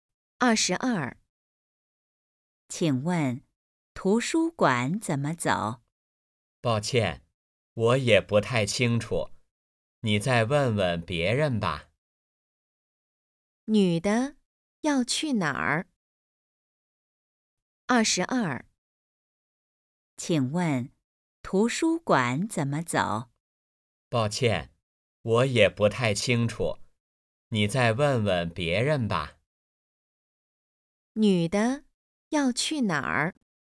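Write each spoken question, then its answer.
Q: 女的要去哪儿?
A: 图书馆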